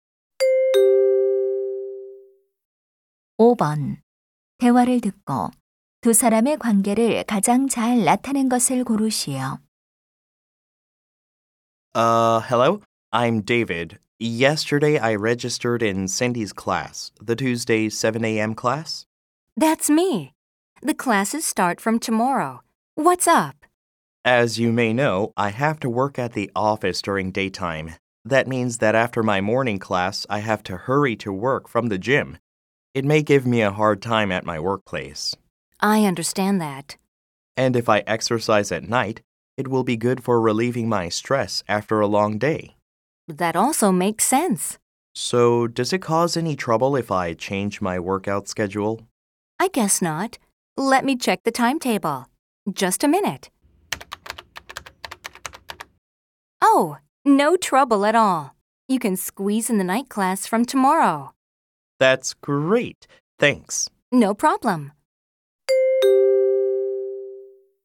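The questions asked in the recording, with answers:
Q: 대화를 듣고 두 사람의 관계를 가장 잘 나타낸 것을 고르시오.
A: 헬스장 강사 - 회원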